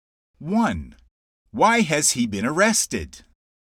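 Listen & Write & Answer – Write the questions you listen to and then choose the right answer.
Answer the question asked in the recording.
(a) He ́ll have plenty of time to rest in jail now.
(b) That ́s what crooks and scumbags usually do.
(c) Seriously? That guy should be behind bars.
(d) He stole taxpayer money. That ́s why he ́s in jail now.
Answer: (d) He stole taxpayer money. That ́s why he ́s in jail now.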